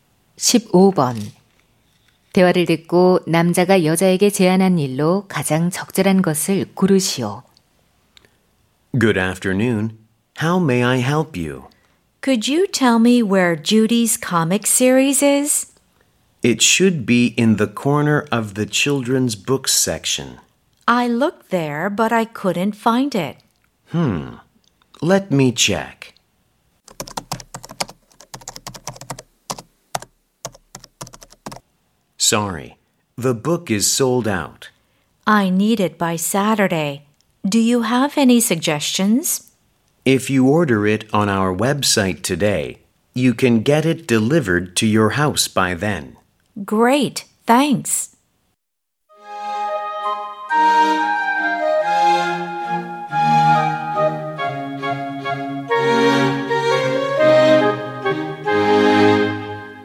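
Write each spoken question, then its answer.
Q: 대화를 듣고 남자가 여자에게 제안한 일로 가장 적절한 것을 고르시오.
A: 웹사이트에서 주문하기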